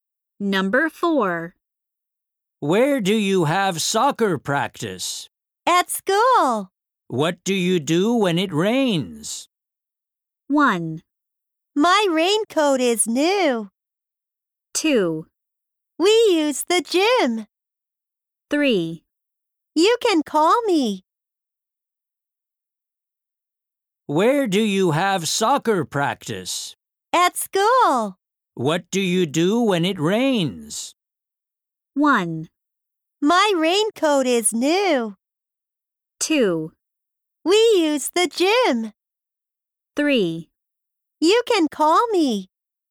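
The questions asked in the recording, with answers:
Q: What do you do when it rains?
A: 2: We use the gym.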